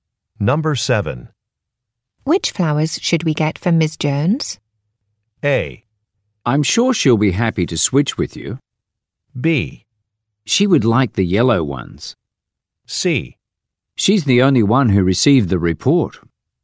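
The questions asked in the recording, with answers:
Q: Which flowers should we get for Ms. Jones?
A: B: She would like the yellow ones.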